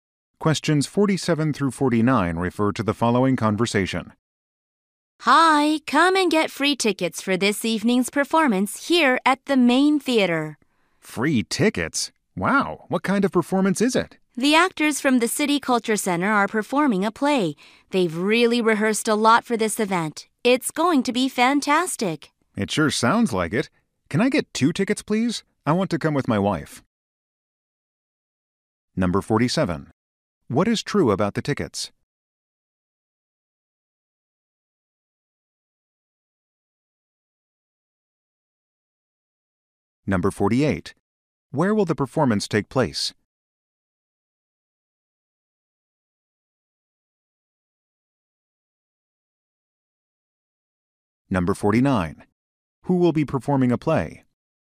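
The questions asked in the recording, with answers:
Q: What is true about the tickets?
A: They are free

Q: Where will the performance take place?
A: At the main theater

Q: Who will be performing a play?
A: Actors from the City Culture Center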